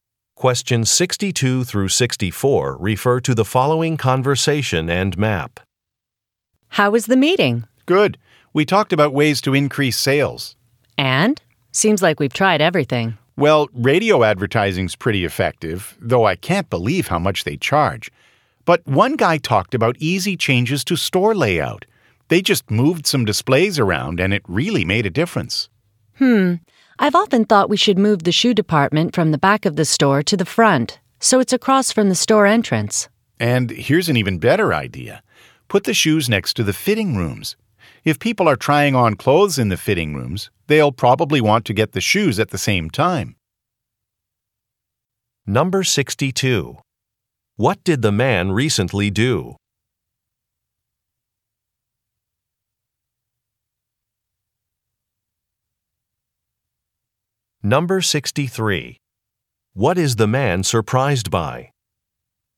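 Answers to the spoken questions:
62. Attended a meeting about increasing sales
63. The cost of radio advertising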